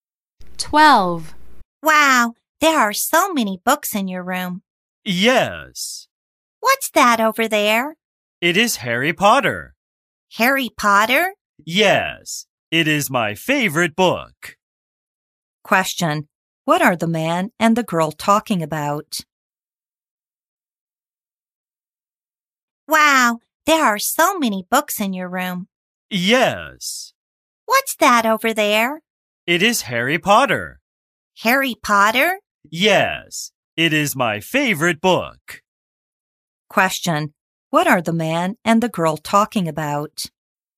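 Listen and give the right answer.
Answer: A book (Harry Potter)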